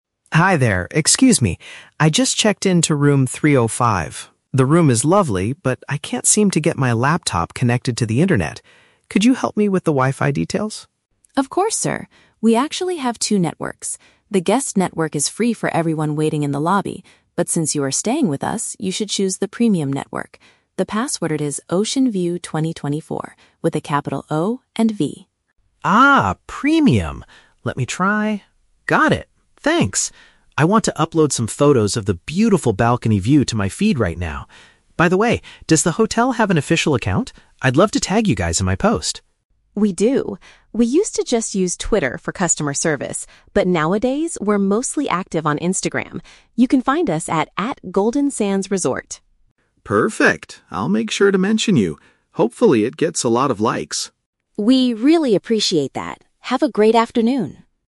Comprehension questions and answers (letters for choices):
Listen to a conversation between a tourist and a hotel receptionist. For each question, choose the correct answer (A, B, or C).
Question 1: Why does the tourist need the internet connection?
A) To book a different room with a better view.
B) To share pictures of his accommodation online.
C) To send a private message to the receptionist.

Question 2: Which internet option should the tourist select?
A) The public service available in the downstairs reception area.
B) A high-speed connection that requires payment by the hour.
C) The exclusive network designated for overnight visitors.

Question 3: How will the tourist link the hotel to his social media update?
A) By sending his pictures to their official Twitter page.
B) By including their specific Instagram username in his post.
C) By leaving a positive review on their main website.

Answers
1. B
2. C
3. B

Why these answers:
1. The tourist says he wants to "upload some photos of the beautiful balcony view to my feed," which means sharing pictures of his accommodation online. Option (A) is a trap; the words "room" and "view" are mentioned, but he is not trying to book a new room. Option (C) is never mentioned.
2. The receptionist tells him that because he is "staying with us" (an overnight visitor), he should choose the "Premium" network. Option (A) is a trap; she mentions the "Guest" network for people in the lobby (reception area), but he should not use that one. Option (B) is plausible for hotels, but not mentioned in the audio.
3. The tourist wants to "tag" the hotel, and the receptionist gives him their Instagram username (@GoldenSandsResort). Option (A) is a trap; she explicitly says they "used to" use Twitter, but they are active on Instagram now. Option (C) is a trap; he might give a positive review, but he is doing it on his own social media feed, not the hotel's website.

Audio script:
Tourist: Hi there, excuse me. I just checked into room 305. The room is lovely, but I can't seem to get my laptop connected to the internet. Could you help me with the Wi-Fi details?
Receptionist: Of course, sir. We actually have two networks. The "Guest" network is free for everyone waiting in the lobby, but since you are staying with us, you should choose the "Premium" network. The password is "OceanView2024" with a capital O and V.
Tourist: Ah, "Premium". Let me try... got it! Thanks. I want to upload some photos of the beautiful balcony view to my feed right now. By the way, does the hotel have an official account? I'd love to tag you guys in my post.
Receptionist: We do! We used to just use Twitter for customer service, but nowadays we're mostly active on Instagram. You can find us at @GoldenSandsResort.
Tourist: Perfect. I'll make sure to mention you. Hopefully, it gets a lot of likes!
Receptionist: We really appreciate that! Have a great afternoon.